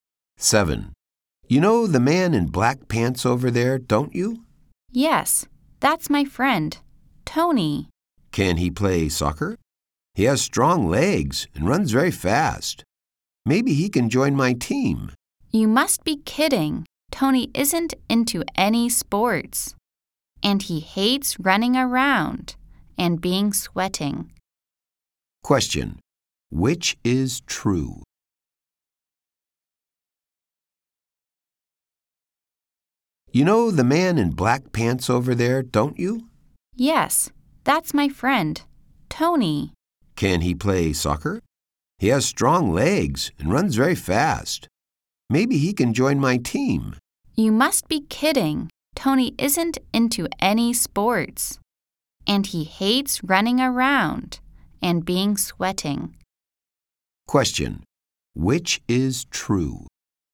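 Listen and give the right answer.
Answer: Tony doesn't like sports.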